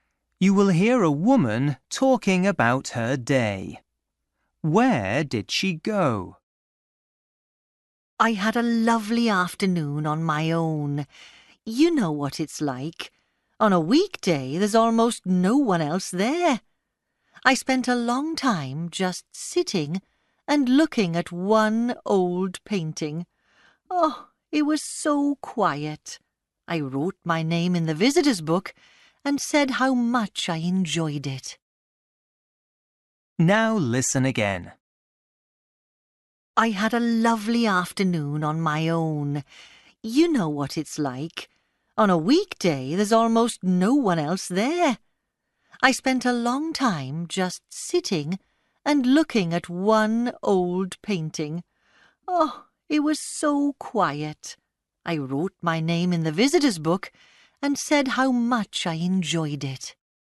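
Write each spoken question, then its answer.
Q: Where did she go?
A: an art gallery (museum)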